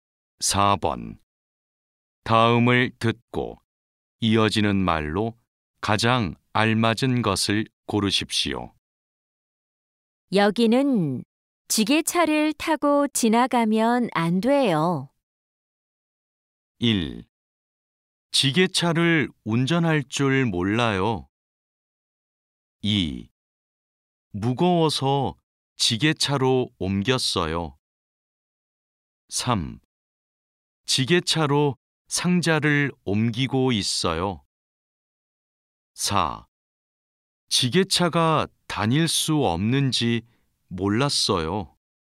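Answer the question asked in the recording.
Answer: 4: 지게차가 다닐 수 없는지 몰랐어요.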